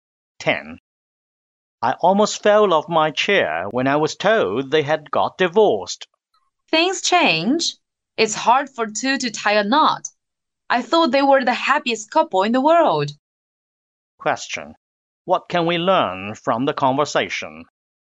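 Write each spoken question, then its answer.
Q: What can we learn from the conversation?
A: A couple they thought happy got divorced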